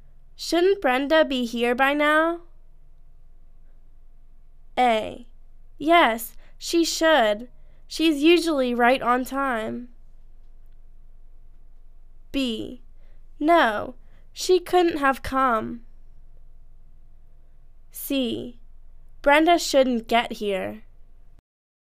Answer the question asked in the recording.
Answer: Yes, she should. She's usually right on time.